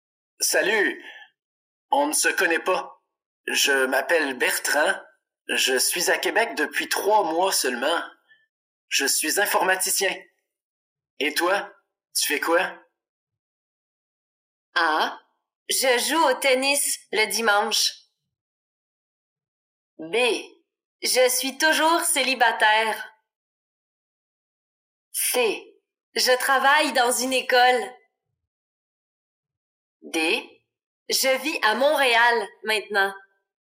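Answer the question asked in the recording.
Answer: C: Je travaille dans une école.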